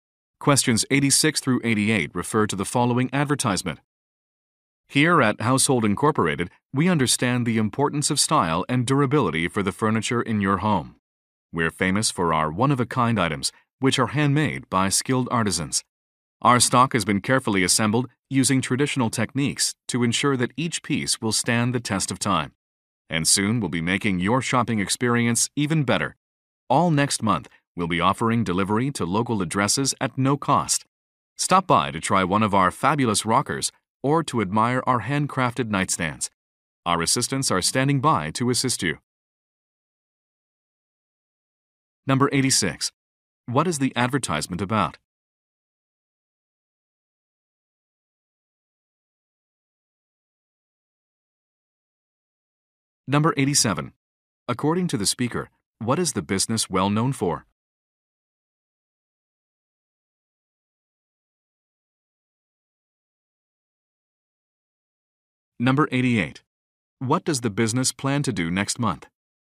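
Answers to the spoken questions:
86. A furniture store
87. One-of-a-kind handmade items
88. Offer free local delivery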